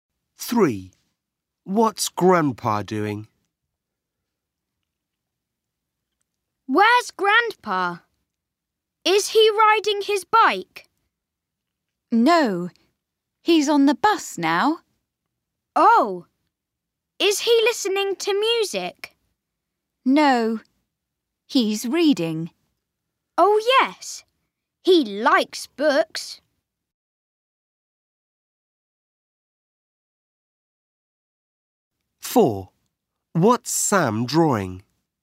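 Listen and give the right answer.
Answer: reading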